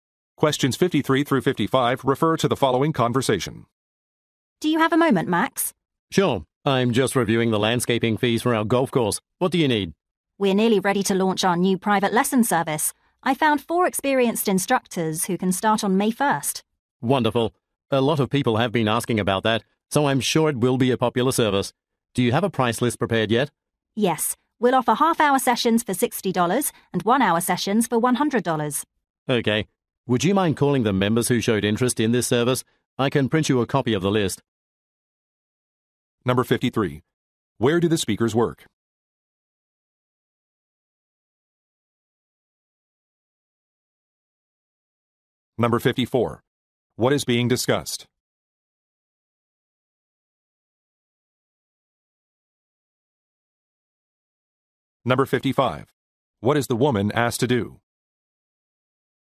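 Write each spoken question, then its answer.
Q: Where do the speakers work?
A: At a golf course

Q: What is being discussed?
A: A new private lesson service

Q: What is the woman asked to do?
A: Call the members who showed interest in the service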